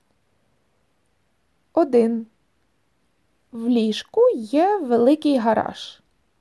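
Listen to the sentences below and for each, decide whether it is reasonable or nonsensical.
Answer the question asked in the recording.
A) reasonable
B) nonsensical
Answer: nonsensical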